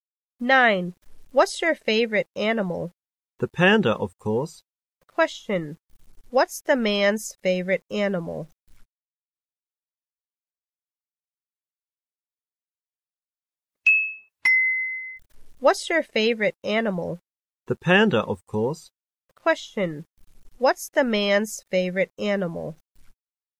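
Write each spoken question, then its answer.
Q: What's the man's favorite animal?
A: The panda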